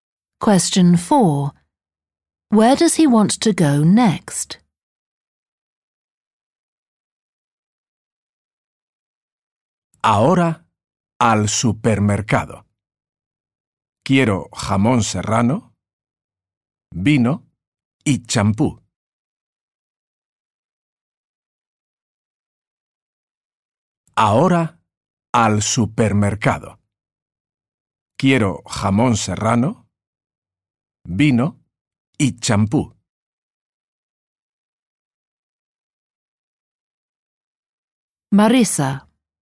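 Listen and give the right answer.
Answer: The supermarket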